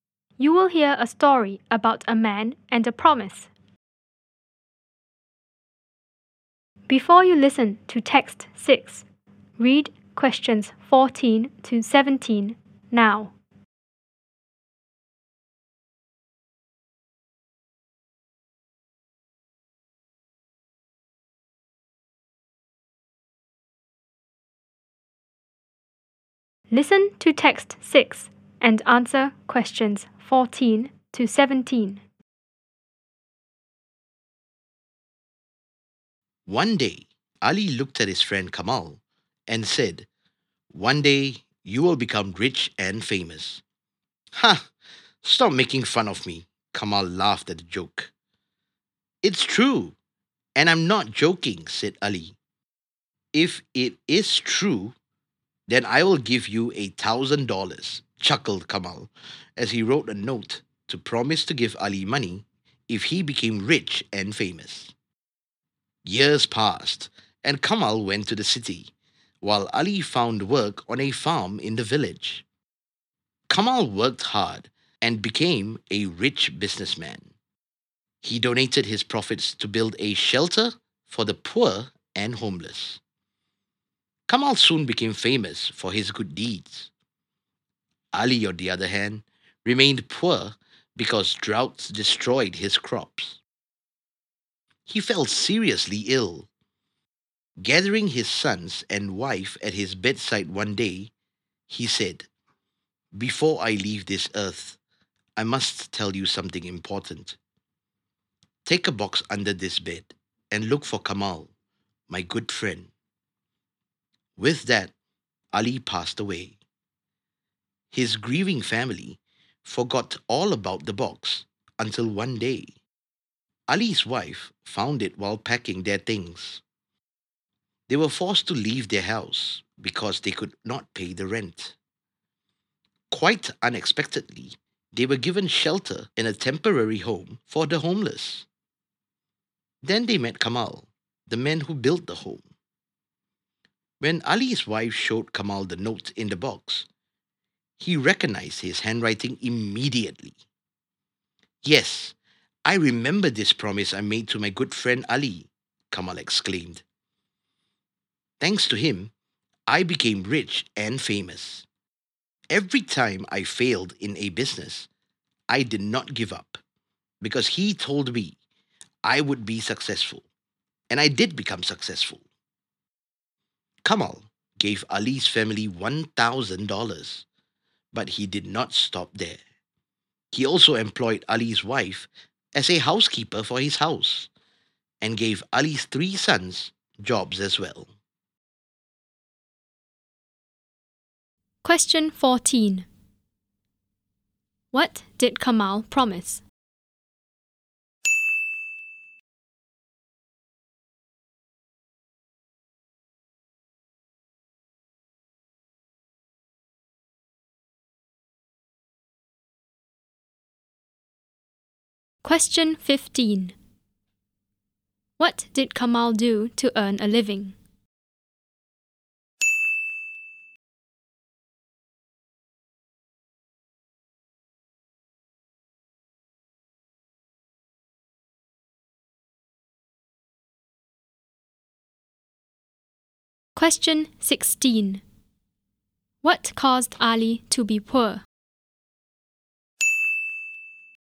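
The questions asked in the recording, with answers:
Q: What did Kamal promise?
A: To give Ali $1,000 if he became rich and famous

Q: What did Kamal do to earn a living?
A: He was a businessman

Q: What caused Ali to be poor?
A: Droughts destroyed his crops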